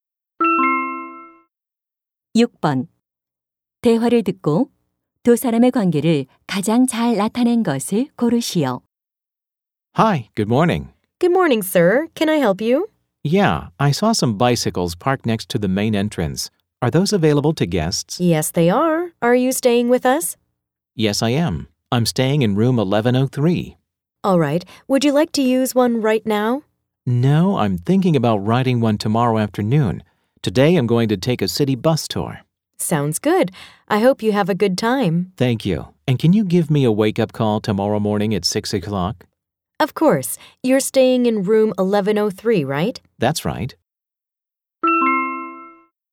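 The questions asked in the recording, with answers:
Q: 대화를 듣고 두 사람의 관계를 가장 잘 나타낸 것을 고르시오.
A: 호텔 투숙객과 호텔 직원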